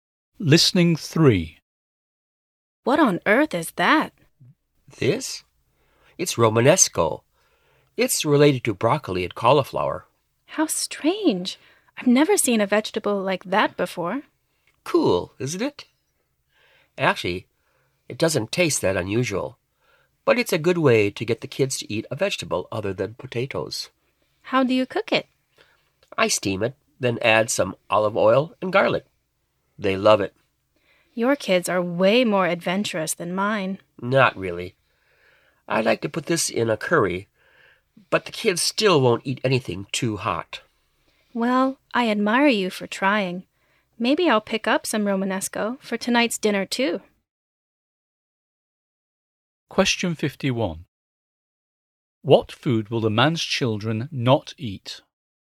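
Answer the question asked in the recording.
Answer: Anything too hot (spicy), like curry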